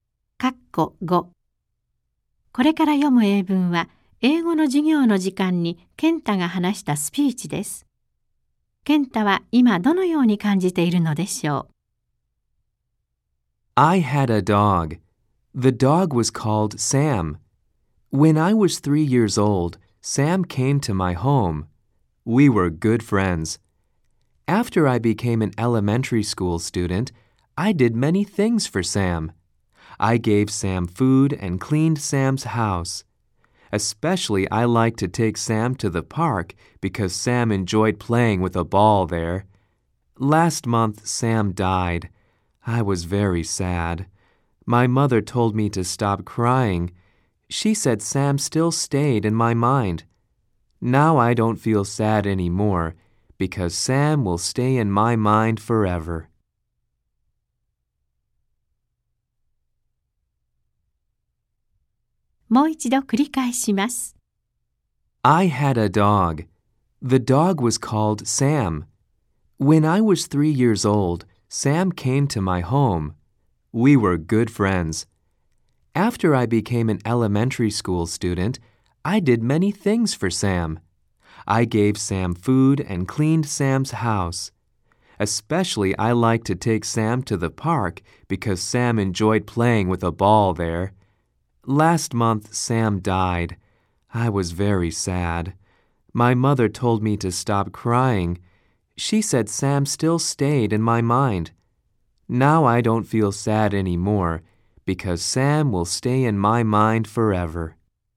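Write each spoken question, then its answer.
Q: ケンタは今どのように感じているのでしょう。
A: もう悲しくない(サムはずっと心の中にいるから)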